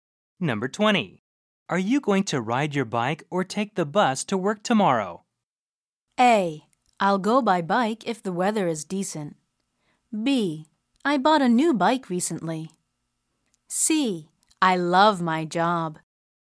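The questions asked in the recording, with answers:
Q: Are you going to ride your bike or take the bus to work tomorrow?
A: A: I'll go by bike if the weather is decent.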